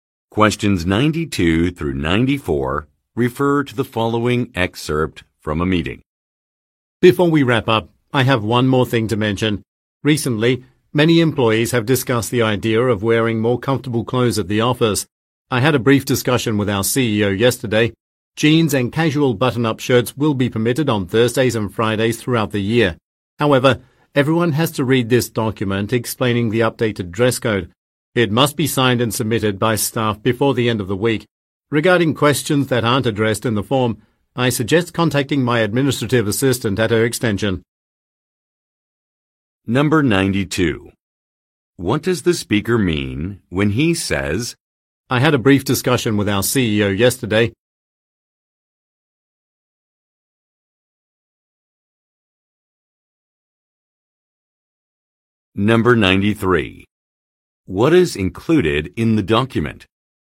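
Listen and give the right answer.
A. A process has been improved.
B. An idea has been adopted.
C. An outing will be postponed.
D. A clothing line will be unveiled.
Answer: B. An idea has been adopted.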